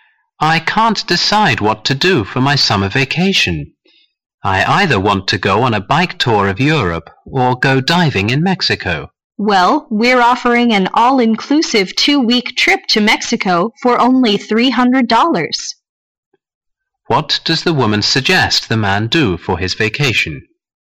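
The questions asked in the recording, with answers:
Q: What does the woman suggest the man do for his vacation?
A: Take the 2-week all-inclusive trip to Mexico.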